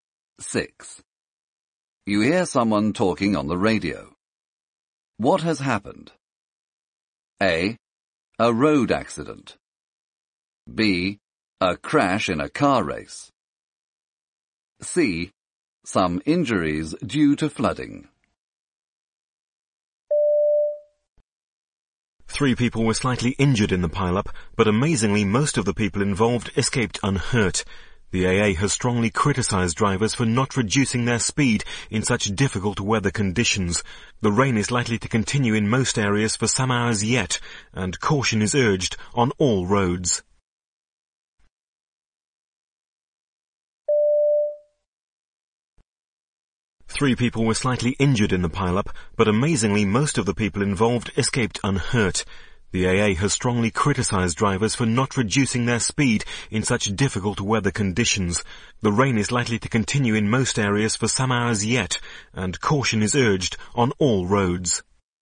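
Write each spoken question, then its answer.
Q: What has happened? A. A road accident.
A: A: A road accident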